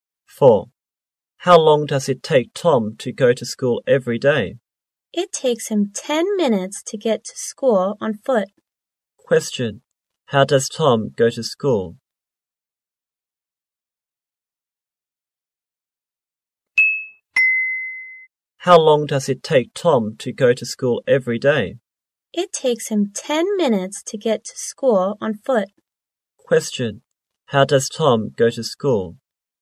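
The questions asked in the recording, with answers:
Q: Question. How does Tom go to school?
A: On foot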